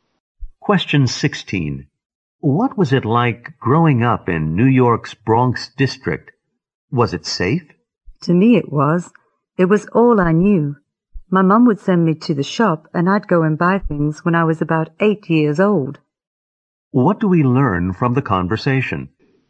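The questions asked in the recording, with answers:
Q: What do we learn from the conversation?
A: To the speaker, growing up in the Bronx felt safe.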